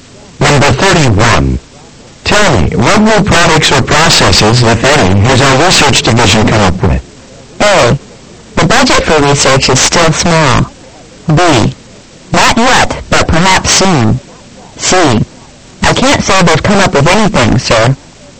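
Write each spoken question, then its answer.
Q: Tell me, what new products or processes, if any, has our research division come up with?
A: C: I can't say they've come up with anything, sir.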